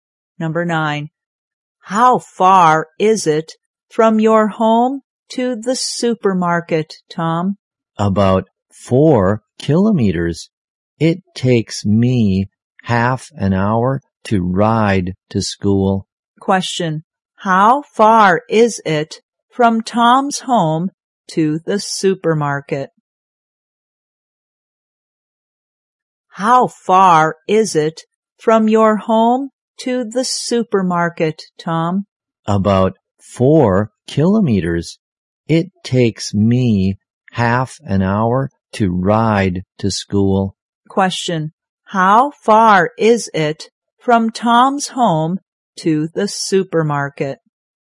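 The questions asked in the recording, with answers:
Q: How far is it from Tom's home to the supermarket?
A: About 4 kilometers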